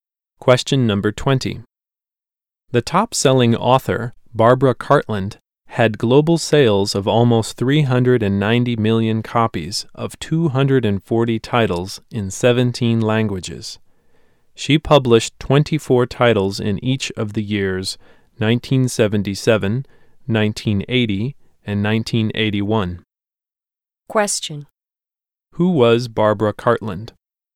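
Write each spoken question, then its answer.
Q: Who was Barbara Cartland?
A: A top-selling author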